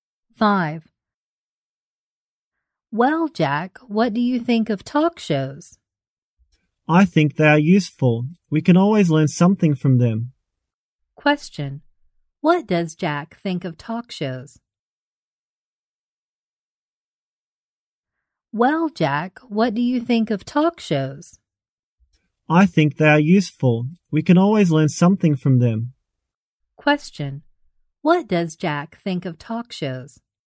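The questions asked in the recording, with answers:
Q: what does Jack think of talk shows?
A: They are useful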